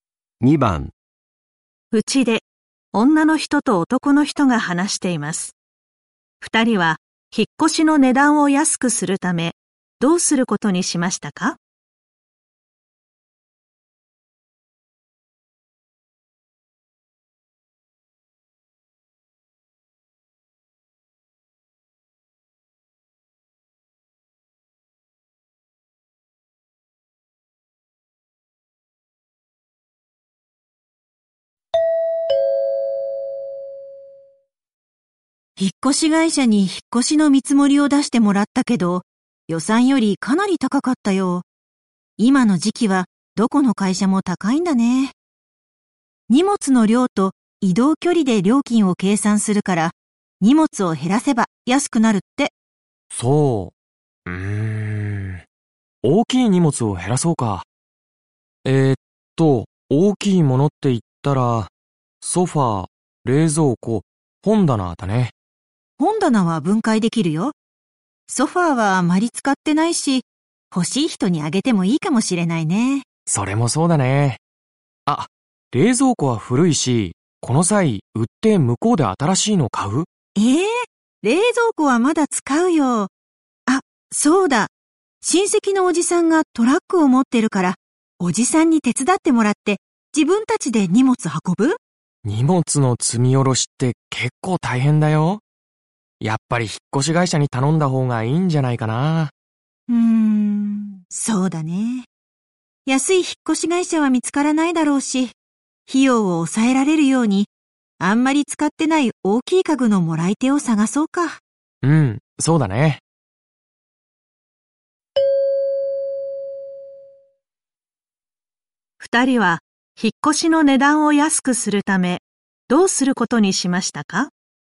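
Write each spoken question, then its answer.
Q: 二人は引っ越しの値段を安くするためどうすることにしましたか?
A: あまり使っていない大きい家具のもらい手を探す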